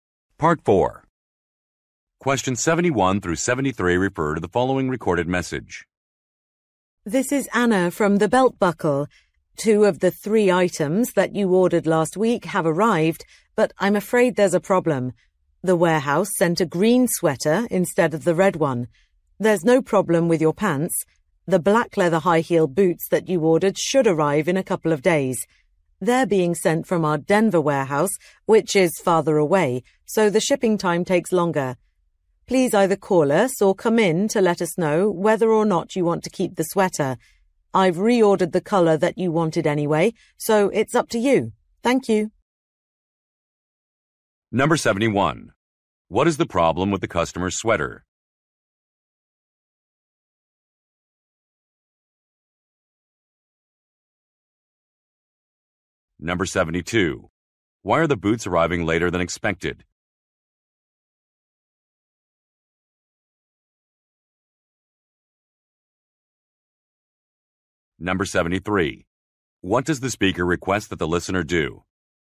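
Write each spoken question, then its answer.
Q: What is the problem with the customer's sweater?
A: It is the wrong color (green instead of red).

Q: Why are the boots arriving later than expected?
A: They are being sent from a warehouse farther away (Denver).

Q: What does the speaker request that the listener do?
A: Call or come in to say whether they want to keep the sweater.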